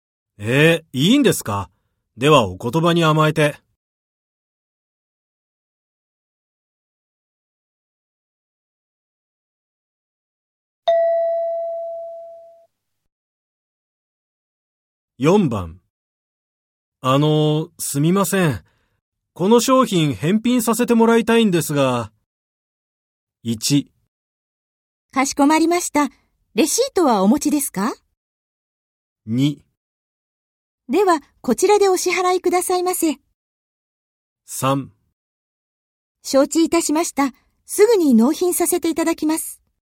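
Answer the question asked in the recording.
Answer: 1: かしこまりました。レシートはお持ちですか?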